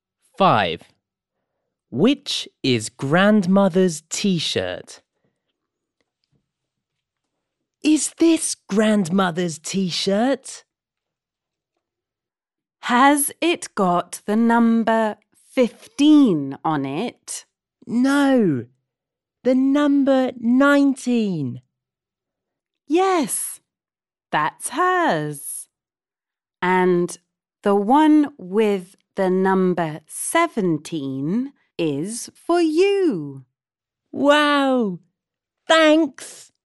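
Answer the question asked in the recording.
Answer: The one with the number 19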